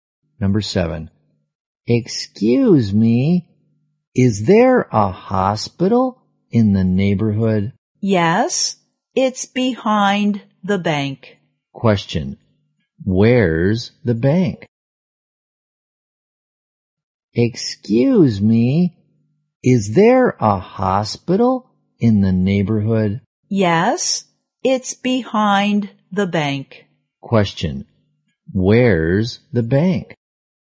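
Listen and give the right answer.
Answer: In front of the hospital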